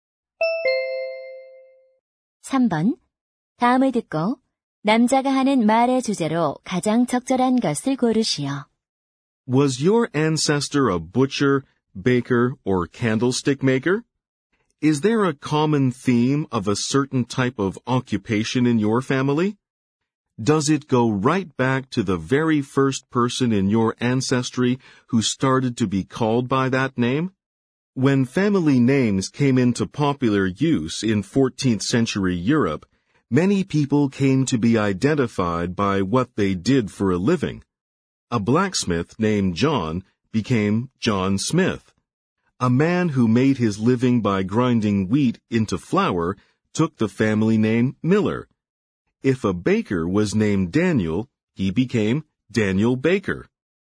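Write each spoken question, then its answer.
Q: 다음을 듣고 남자가 하는 말의 주제로 가장 적절한 것을 고르시오.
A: 직업에서 유래한 성(姓)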